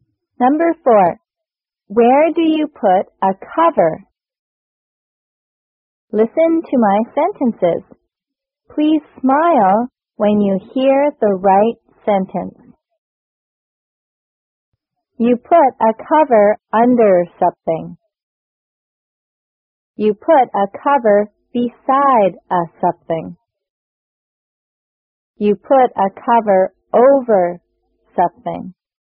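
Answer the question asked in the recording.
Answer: You put a cover over something.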